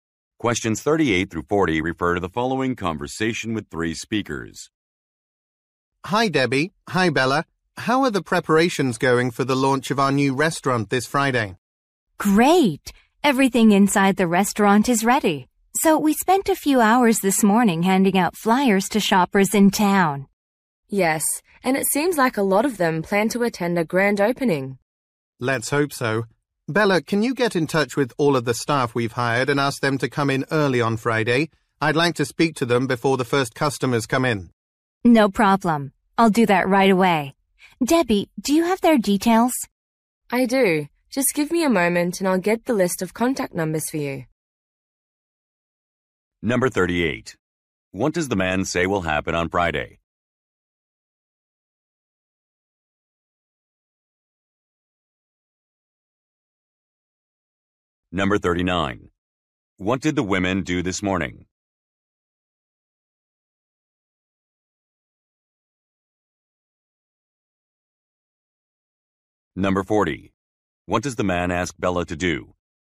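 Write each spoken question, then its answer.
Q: What does the man say will happen on Friday?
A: A new restaurant will open

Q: What did the women do this morning?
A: Handed out flyers in town

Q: What does the man ask Bella to do?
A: Contact the staff and ask them to come in early on Friday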